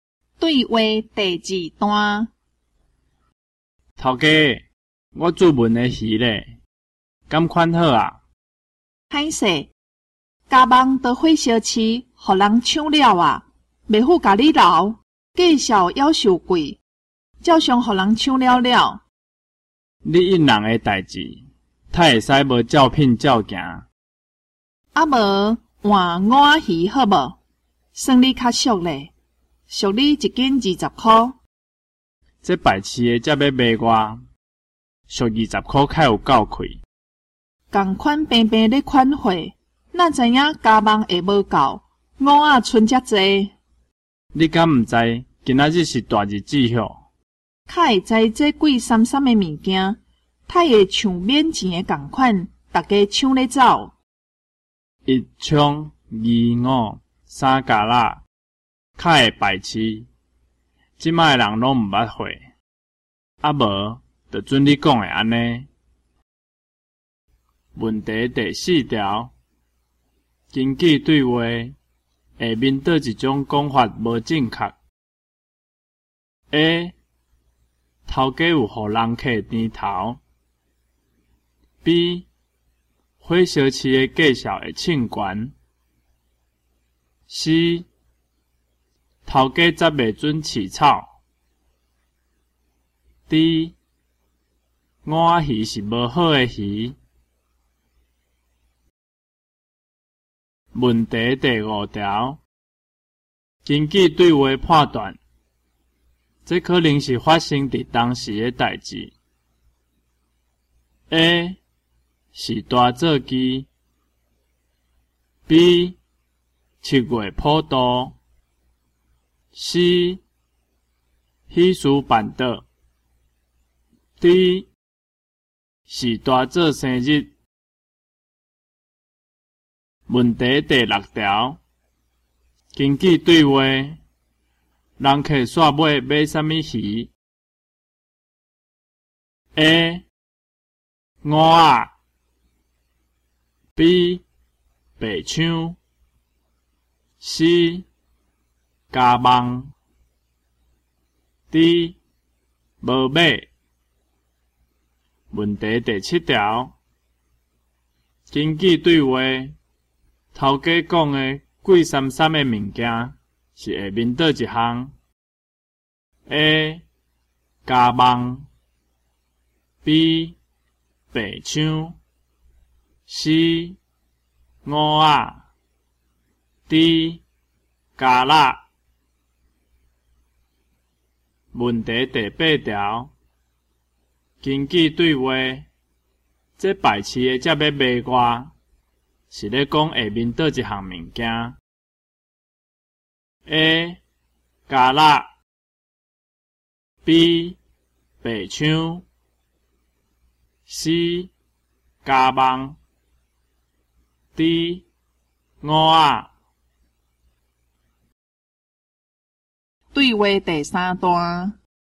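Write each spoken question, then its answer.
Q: 根据对话,人客煞尾买啥物鱼 ?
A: A: 五仔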